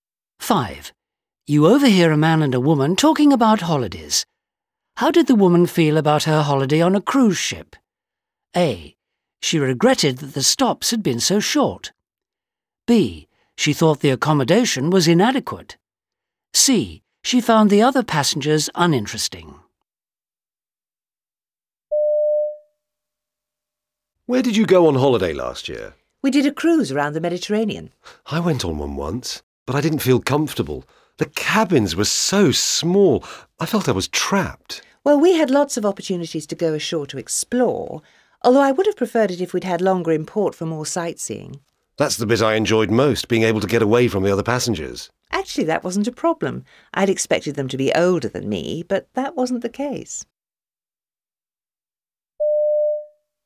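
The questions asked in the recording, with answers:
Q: How did the woman feel about her holiday on a cruise ship?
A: A: She regretted that the stops had been so short.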